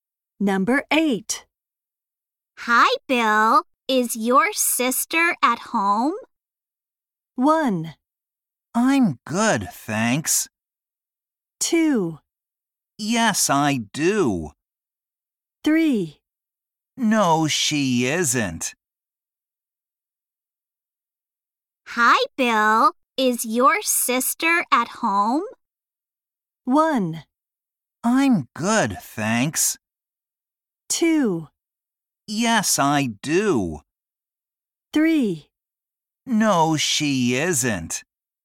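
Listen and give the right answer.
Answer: 3: No, she isn't.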